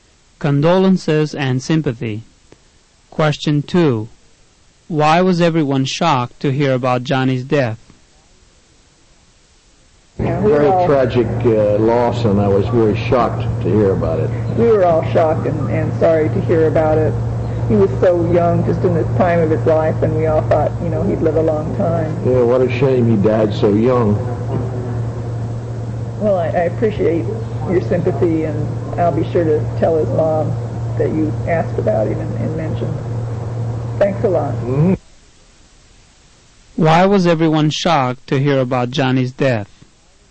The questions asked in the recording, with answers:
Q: Why was everyone shocked to hear about Johnny's death?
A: The answer is B. Johnny was so young that everyone thought he'd live a long time.